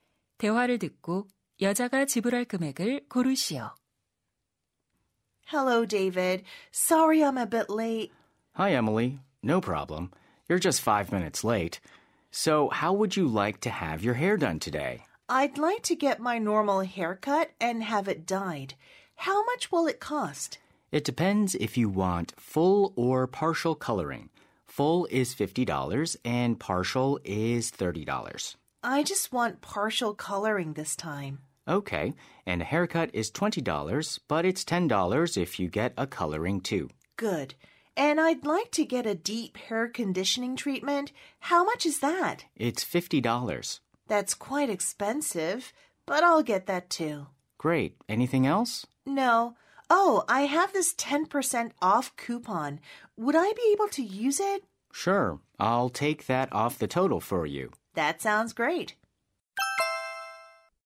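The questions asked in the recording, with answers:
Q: 대화를 듣고 여자가 지불할 금액을 고르시오.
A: $81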